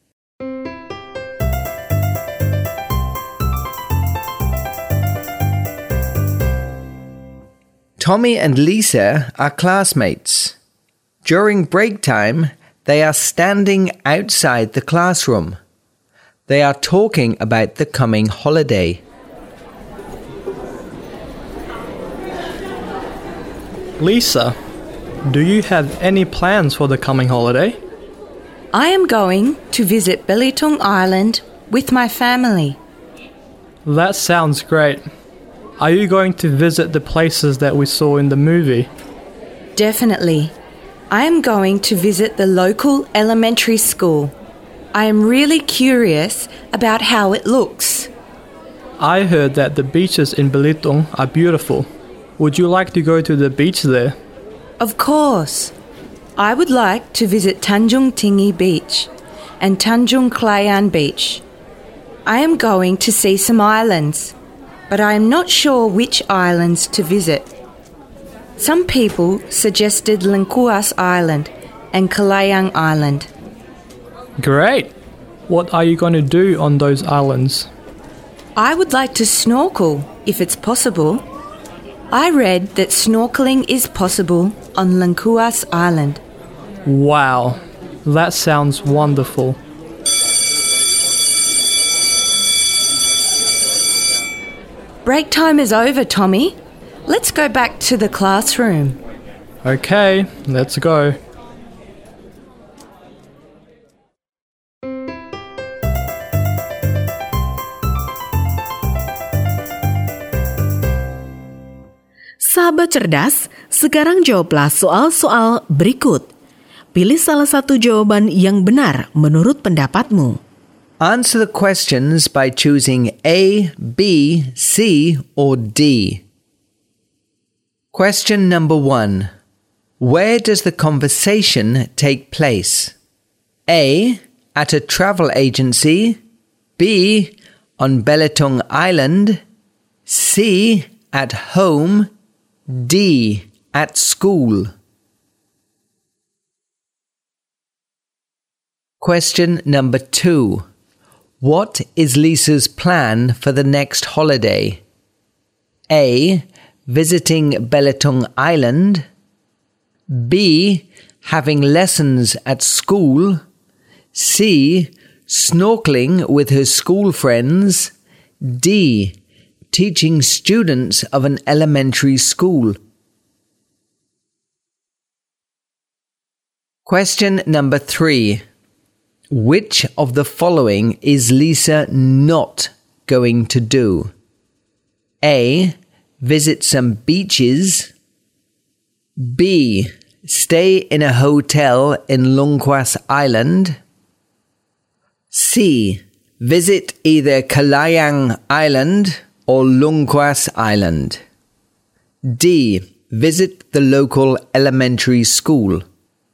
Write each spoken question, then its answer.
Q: Where does the conversation take place?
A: D. At school.

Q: What is Lisa's plan for the next holiday?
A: A. Visiting Belitung Island.

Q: Which of the following is Lisa not going to do?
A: B. Stay in a hotel in Lungkwas Island.